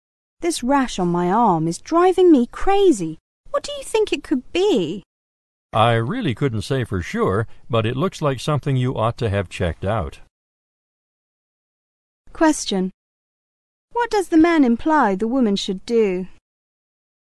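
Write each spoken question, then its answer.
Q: What does the man imply the woman should do?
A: Have a doctor look at the rash.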